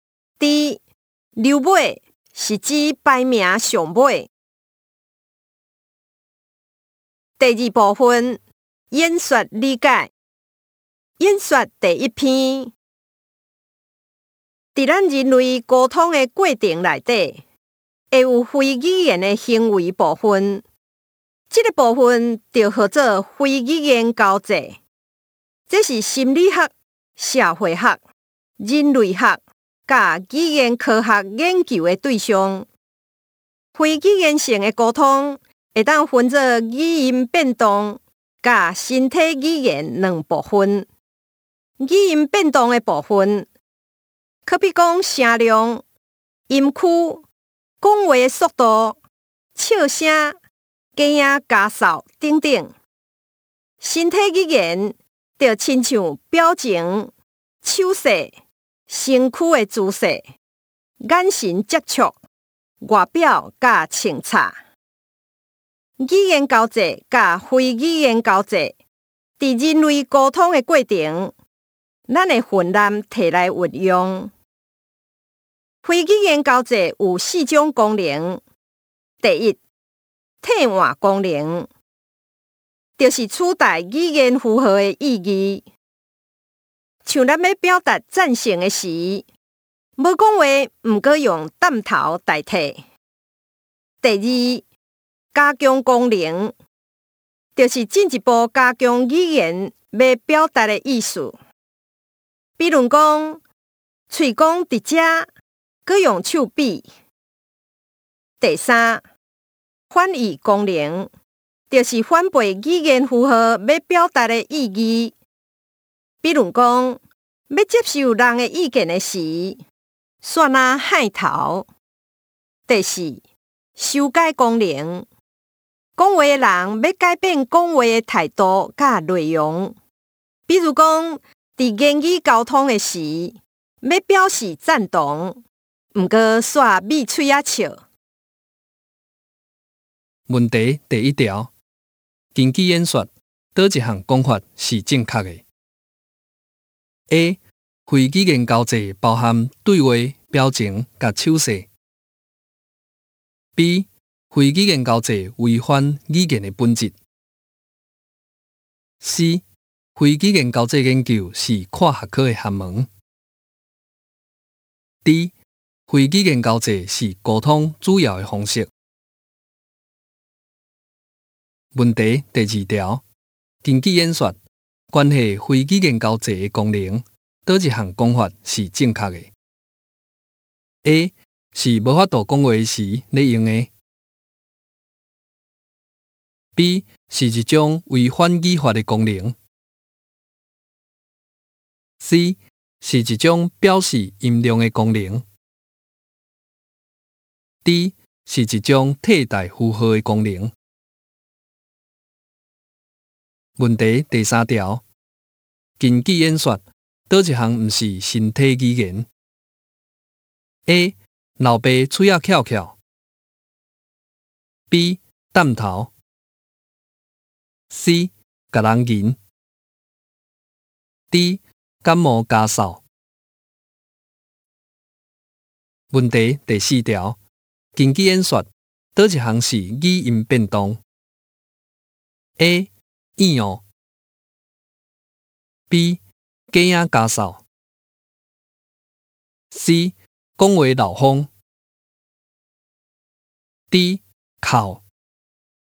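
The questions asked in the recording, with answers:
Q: 根据演说,哪一项讲法是正确的 ?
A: C: 非语言交际研究是跨学科的学问。

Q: 根据演说,关系非语言交际的功能,哪一项讲法是正确的 ?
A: D: 是一种替代符号的功能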